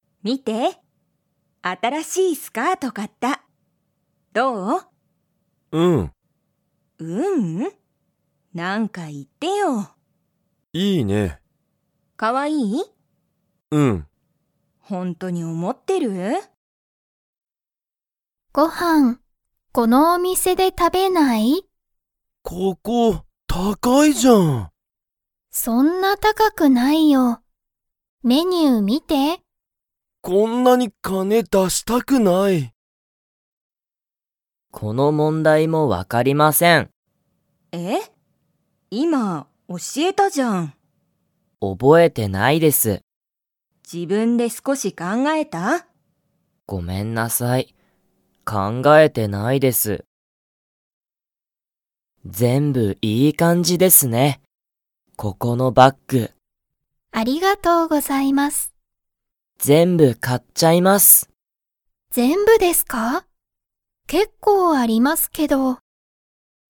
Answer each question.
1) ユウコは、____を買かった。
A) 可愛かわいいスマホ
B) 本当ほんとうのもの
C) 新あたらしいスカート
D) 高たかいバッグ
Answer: C) 新あたらしいスカート

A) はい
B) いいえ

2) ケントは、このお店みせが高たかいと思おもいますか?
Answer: A) はい

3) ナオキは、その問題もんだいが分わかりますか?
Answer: B) いいえ

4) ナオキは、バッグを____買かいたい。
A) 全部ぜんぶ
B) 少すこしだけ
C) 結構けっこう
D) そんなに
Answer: A) 全部ぜんぶ

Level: Level 1

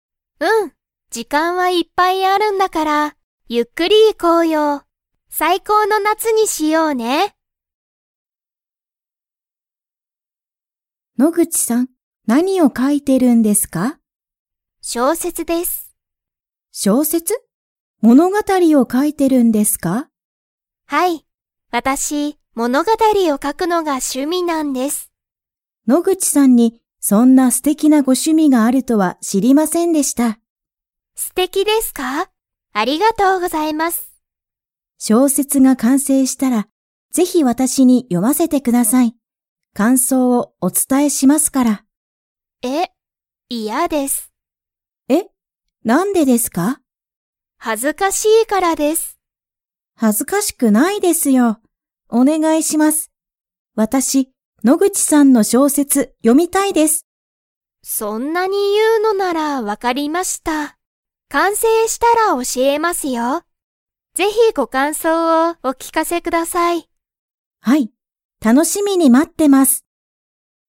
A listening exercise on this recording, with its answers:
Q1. 野口のぐちさんの趣味しゅみは何なんですか?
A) 絵えを描かくこと。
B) 絵えを見みること。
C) 小説しょうせつを読よむこと。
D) 小説しょうせつを書かくこと。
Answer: D) 小説しょうせつを書かくこと。

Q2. 杉山すぎやまさんは、野口のぐちさんの小説しょうせつを 。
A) 読よむ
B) 読よまない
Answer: A) 読よむ

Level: Level 4

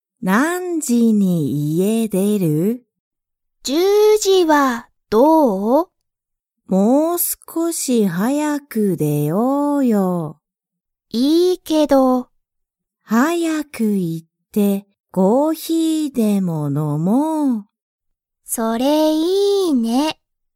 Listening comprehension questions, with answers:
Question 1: ハルとアキは、早(はや)く出(で)て、____を飲(の)む。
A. 水(みず)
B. コーヒー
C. ジュース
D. コーラ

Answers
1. B. コーヒー

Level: Level 1

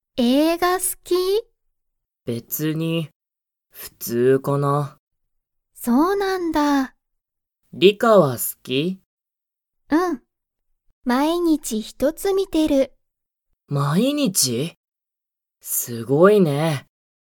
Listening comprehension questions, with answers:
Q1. リカは、映画(えいが)が好(す)きですか?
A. はい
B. いいえ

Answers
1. A. はい

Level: Level 1

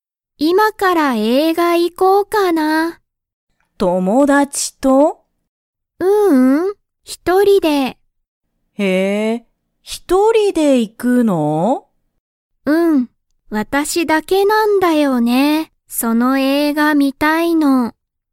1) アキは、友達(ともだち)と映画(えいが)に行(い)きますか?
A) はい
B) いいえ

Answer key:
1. B) いいえ

